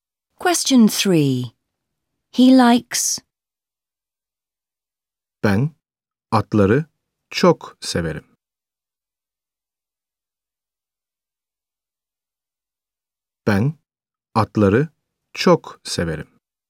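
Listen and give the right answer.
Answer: horses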